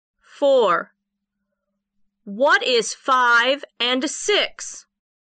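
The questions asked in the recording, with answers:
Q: What is 5 and 6?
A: 11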